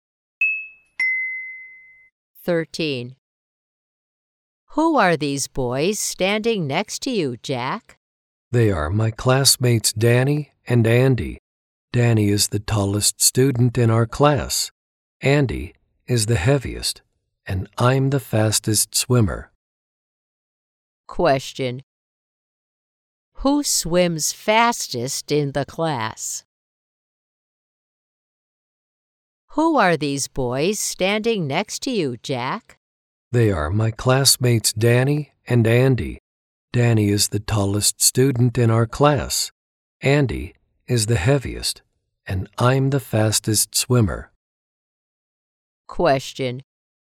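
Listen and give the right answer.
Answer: Jack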